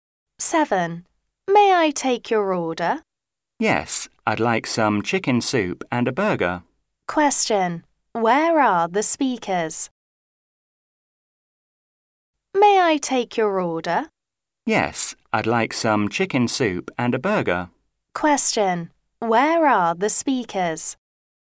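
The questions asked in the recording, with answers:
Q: Question. Where are the speakers?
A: In a restaurant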